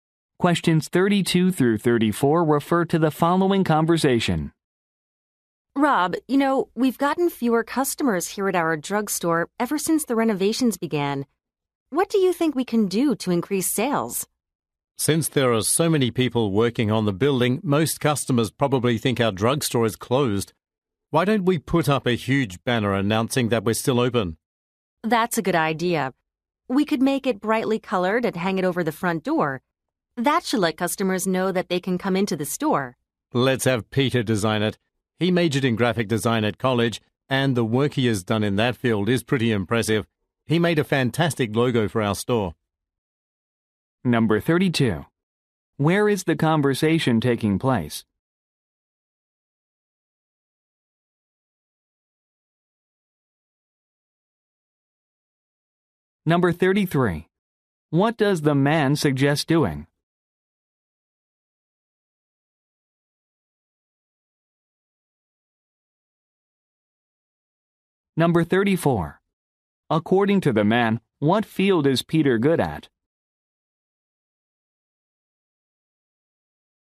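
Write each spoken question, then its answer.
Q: Where is the conversation taking place?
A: At a drugstore

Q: What does the man suggest doing?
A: Putting up a banner saying the store is open

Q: According to the man, what field is Peter good at?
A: Graphic design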